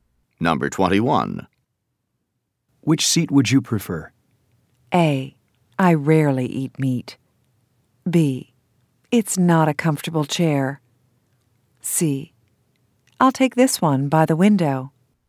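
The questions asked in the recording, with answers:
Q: Which seat would you prefer?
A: C: I'll take this one by the window.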